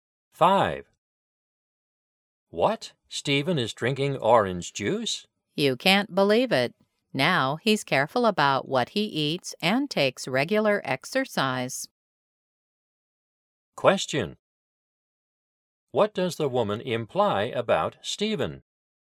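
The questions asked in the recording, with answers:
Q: What does the woman imply about Stephen?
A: He has changed to a healthy lifestyle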